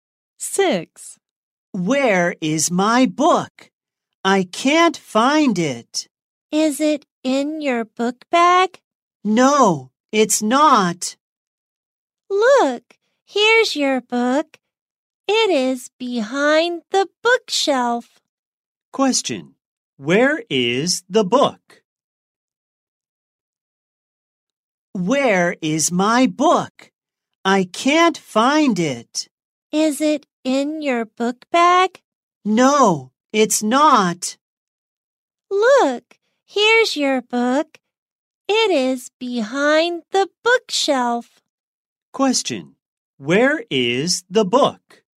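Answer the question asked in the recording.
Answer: Behind the bookshelf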